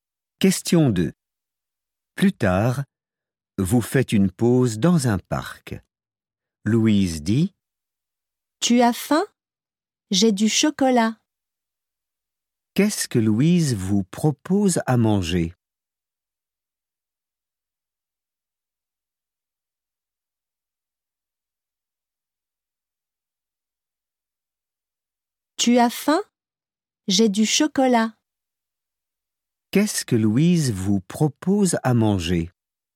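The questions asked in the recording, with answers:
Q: Qu'est-ce que Louise vous propose à manger?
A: Du chocolat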